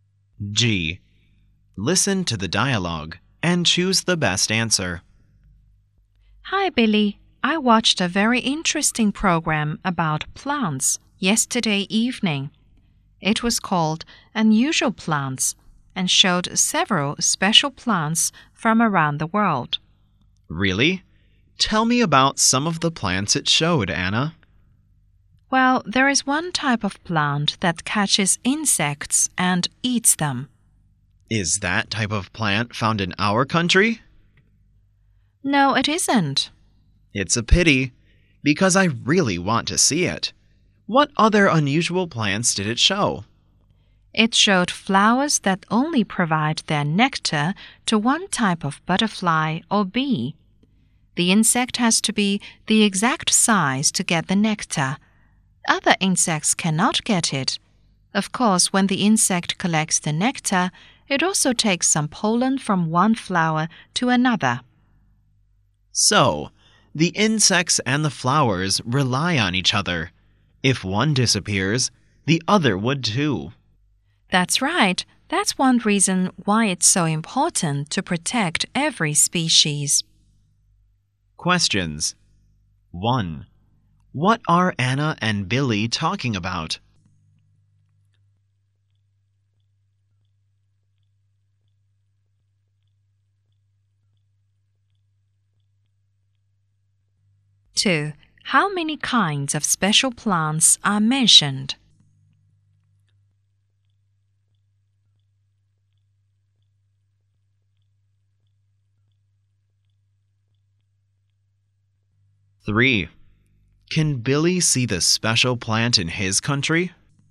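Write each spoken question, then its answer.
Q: What are Anna and Billy talking about?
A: A TV program about unusual plants

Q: How many kinds of special plants are mentioned?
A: Two

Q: Can Billy see the special plant in his country?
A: No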